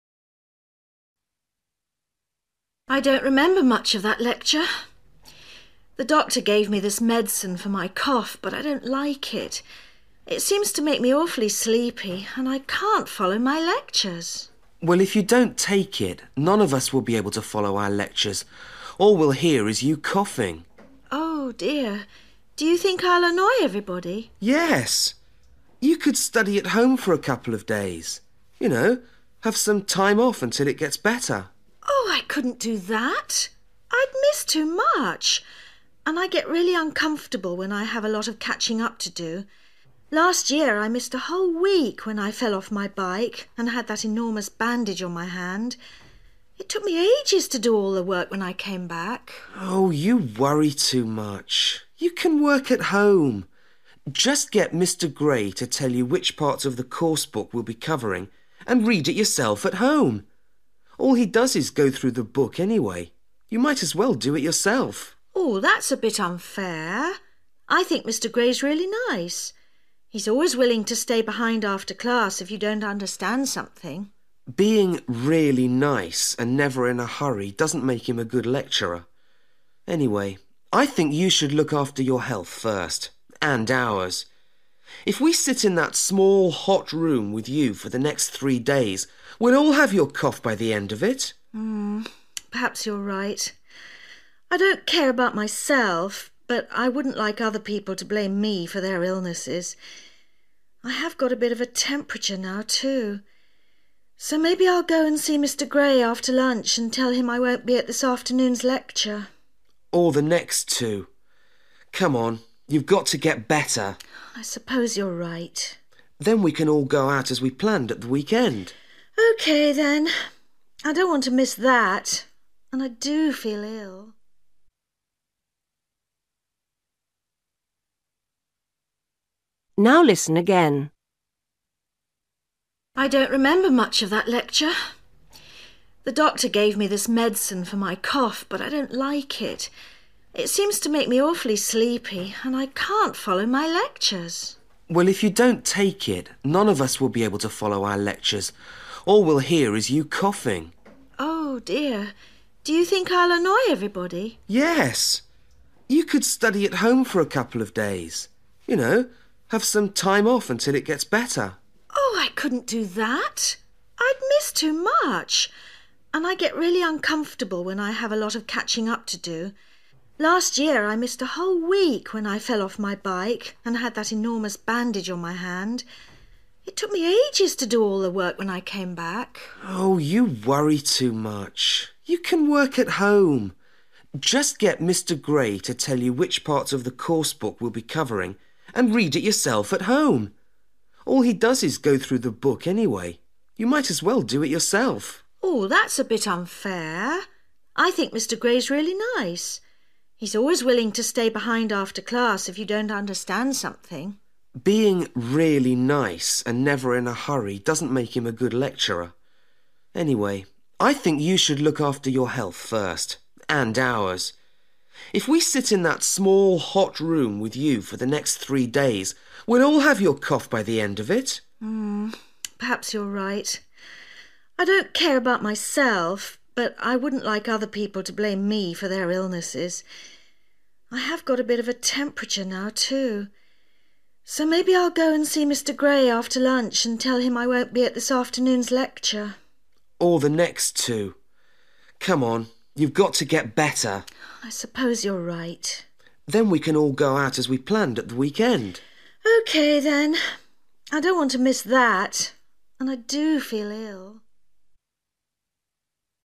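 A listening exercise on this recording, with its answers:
Decide if each sentence is correct or incorrect. If it is correct, choose YES. If it is not correct, choose NO.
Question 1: Kate has stopped taking her medicine.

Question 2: George thinks Kate should stay away from class.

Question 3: Kate had an accident on her bike last week.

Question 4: George thinks Mr Gray is a lazy lecturer.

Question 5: Kate will miss three lectures.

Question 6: Kate wants to stay at home at the weekend.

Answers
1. NO
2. YES
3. NO
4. YES
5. YES
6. NO

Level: Luyện nghe trình độ B1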